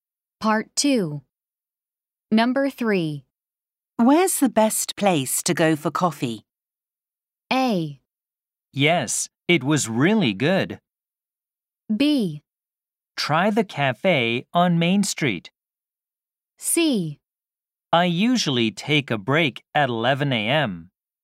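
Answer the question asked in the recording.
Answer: B: Try the cafe on Main Street.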